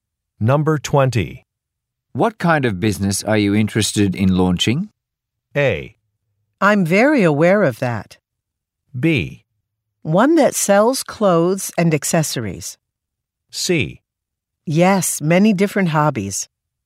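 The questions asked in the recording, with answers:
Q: What kind of business are you interested in launching?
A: B: One that sells clothes and accessories.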